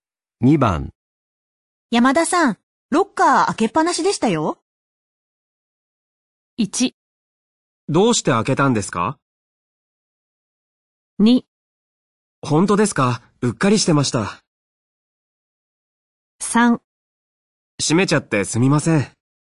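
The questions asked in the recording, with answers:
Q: 山田さん、ロッカー開けっぱなしでしたよ。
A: 2: 本当ですか?うっかりしてました。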